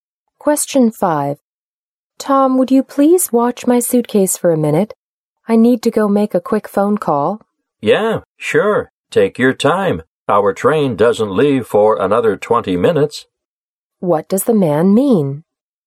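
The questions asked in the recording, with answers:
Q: What does the man mean?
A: He will watch the suitcase; there is plenty of time before the train leaves.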